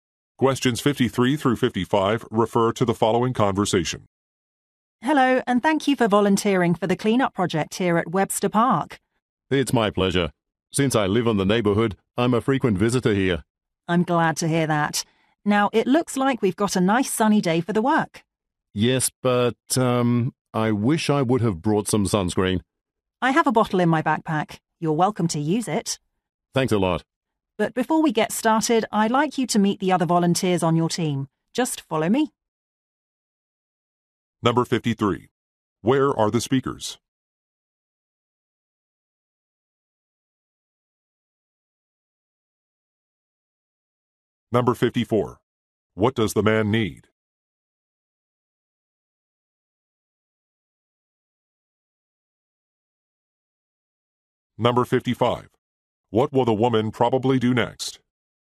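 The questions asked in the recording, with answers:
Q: Where are the speakers?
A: At Webster Park

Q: What does the man need?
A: Sunscreen

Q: What will the woman probably do next?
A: Introduce him to the other volunteers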